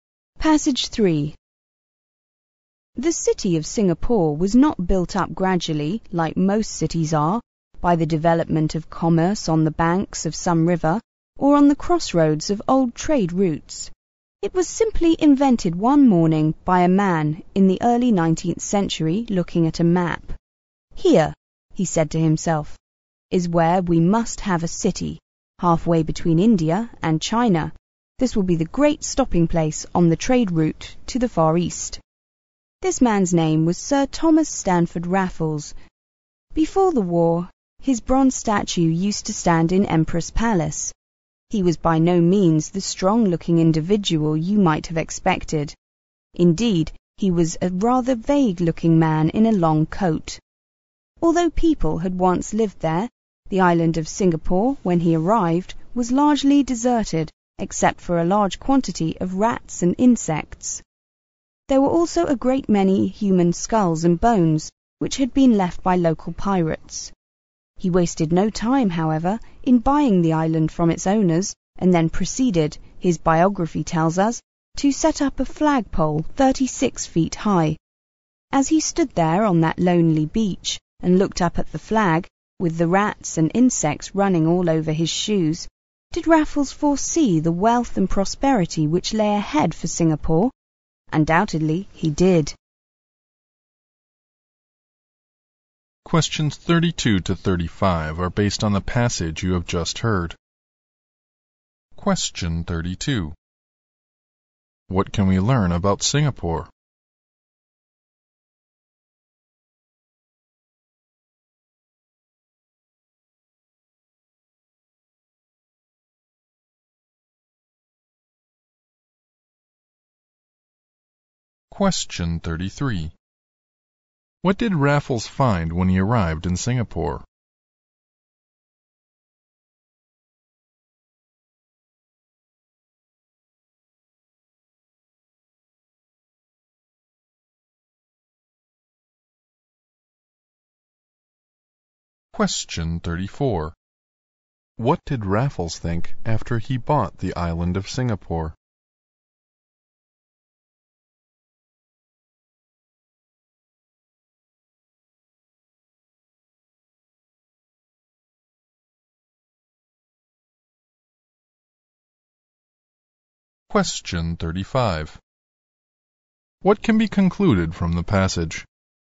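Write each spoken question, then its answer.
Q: What did Raffles find when he arrived in Singapore?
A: A largely deserted island with rats, insects and human bones

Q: What did Raffles think after he bought the island of Singapore?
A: That Singapore would become wealthy and prosperous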